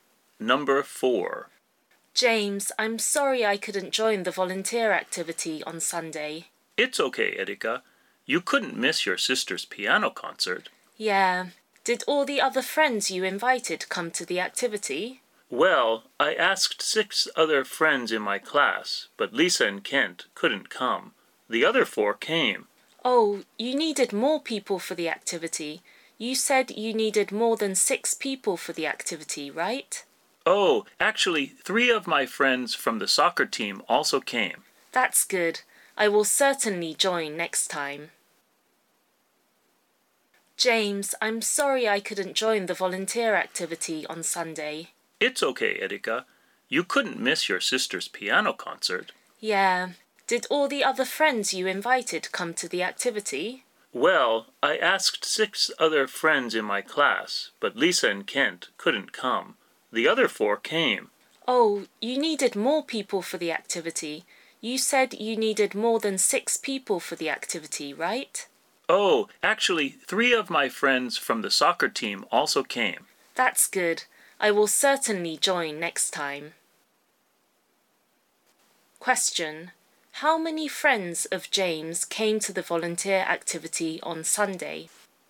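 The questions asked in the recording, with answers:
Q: how many friends of James came to the volunteer activity on Sunday?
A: Seven (four classmates and three from the soccer team)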